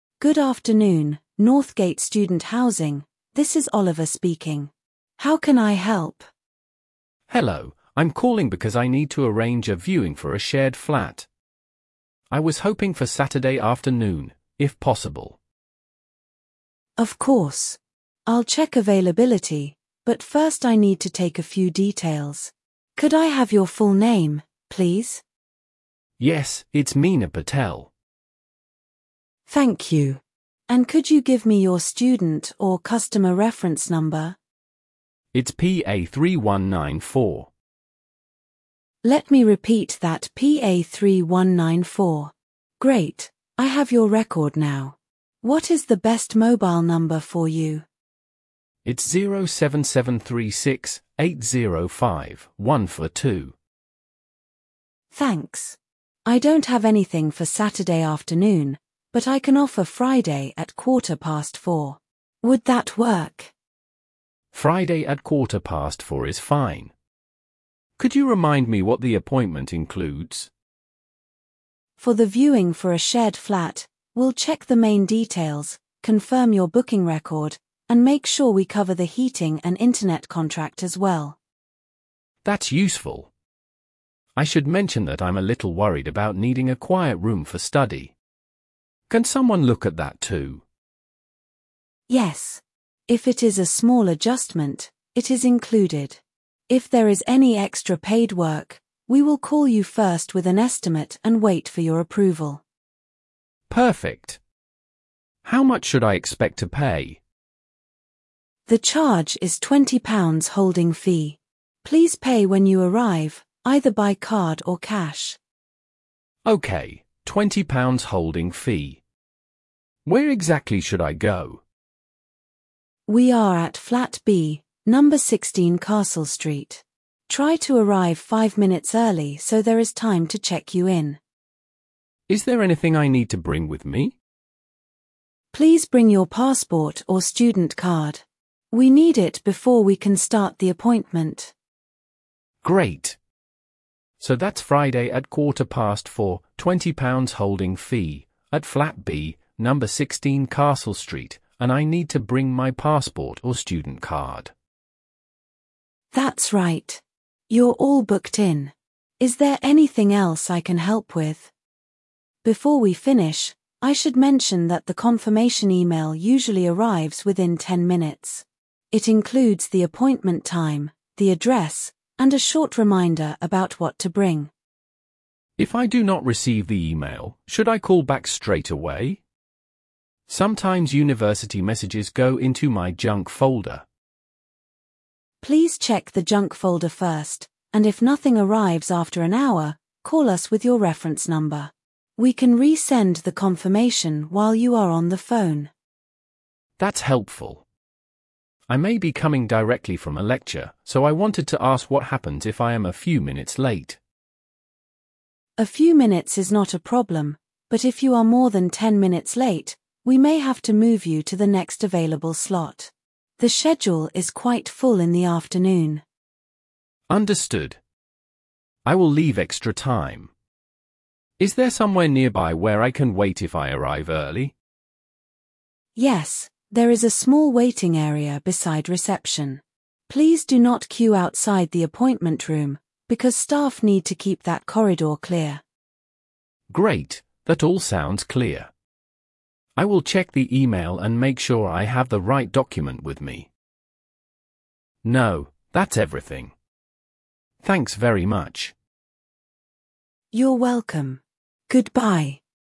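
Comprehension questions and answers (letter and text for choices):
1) What service does the caller want to arrange?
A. A refund request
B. Viewing for a shared flat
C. A lecture ticket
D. A library renewal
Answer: B. Viewing for a shared flat

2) Which day is the appointment booked for?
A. Monday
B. Friday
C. Saturday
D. Sunday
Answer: B. Friday

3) What time is the appointment?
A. Nine fifteen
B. quarter past four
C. Two o'clock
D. Six forty-five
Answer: B. quarter past four

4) How much will the caller pay?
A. Free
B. Ten pounds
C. Twenty pounds holding fee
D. One hundred pounds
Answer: C. Twenty pounds holding fee

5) Where should the caller go?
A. Flat b, number sixteen castle street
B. The main library entrance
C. Room twenty on the top floor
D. The city bus station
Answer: A. Flat b, number sixteen castle street

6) What must the caller bring?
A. A printed map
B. Passport or student card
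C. A passport photo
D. A bank statement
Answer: B. Passport or student card

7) What will happen if extra paid work is needed?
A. It will be done automatically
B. The booking will be cancelled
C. The caller will be contacted first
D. The fee will be doubled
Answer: C. The caller will be contacted first

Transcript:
Staff: Good afternoon, Northgate Student Housing, this is Oliver speaking. How can I help?
Student: Hello, I'm calling because I need to arrange a viewing for a shared flat. I was hoping for Saturday afternoon, if possible.
Staff: Of course. I'll check availability, but first I need to take a few details. Could I have your full name, please?
Student: Yes, it's Mina Patel.
Staff: Thank you. And could you give me your student or customer reference number?
Great, I have your record now. What is the best mobile number for you?
Staff: Thanks. I don't have anything for Saturday afternoon, but I can offer Friday at quarter past four. 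Would that work?
Could you remind me what the appointment includes?
Staff: For the viewing for a shared flat, we'll check the main details, confirm your booking record, and make sure we cover the heating and internet contract as well.
Student: That's useful. I should mention that I'm a little worried about needing a quiet room for study. Can someone look at that too?
Staff: Yes. If it is a small adjustment, it is included. If there is any extra paid work, we will call you first with an estimate and wait for your approval.
Student: Perfect. How much should I expect to pay?
Staff: The charge is twenty pounds holding fee. Please pay when you arrive, either by card or cash.
Student: Okay, twenty pounds holding fee. Where exactly should I go?
Staff: We are at Flat B, number sixteen Castle Street. Try to arrive five minutes early so there is time to check you in.
Student: Is there anything I need to bring with me?
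Staff: Please bring your passport or student card. We need it before we can start the appointment.
Student: Great. So that's Friday at quarter past four, twenty pounds holding fee, at Flat B, number sixteen Castle Street, and I need to bring my passport or student card.
Staff: That's right. You're all booked in. Is there anything else I can help with?
Staff: Before we finish, I should mention that the confirmation email usually arrives within ten minutes. It includes the appointment time, the address, and a short reminder about what to bring.
Student: If I do not receive the email, should I call back straight away? Sometimes university messages go into my junk folder.
Staff: Please check the junk folder first, and if nothing arrives after an hour, call us with your reference number. We can resend the confirmation while you are on the phone.
Student: That's helpful. I may be coming directly from a lecture, so I wanted to ask what happens if I am a few minutes late.
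Staff: A few minutes is not a problem, but if you are more than ten minutes late, we may have to move you to the next available slot. The schedule is quite full in the afternoon.
Student: Understood. I will leave extra time. Is there somewhere nearby where I can wait if I arrive early?
Staff: Yes, there is a small waiting area beside reception. Please do not queue outside the appointment room, because staff need to keep that corridor clear.
Student: Great, that all sounds clear. I will check the email and make sure I have the right document with me.
Student: No, that's everything. Thanks very much.
Staff: You're welcome. Goodbye.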